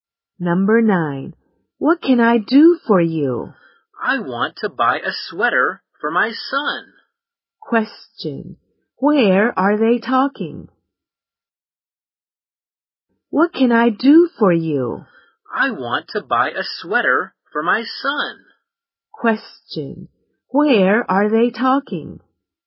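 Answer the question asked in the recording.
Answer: In a clothes store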